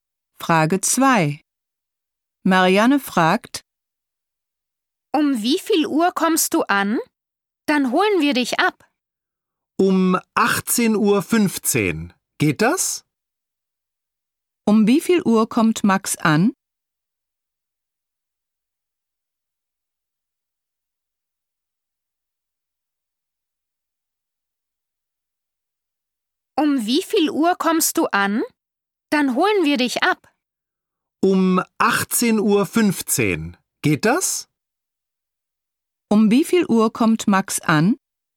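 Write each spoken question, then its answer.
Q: Um wie viel Uhr kommt Max an?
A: Um 18.15 Uhr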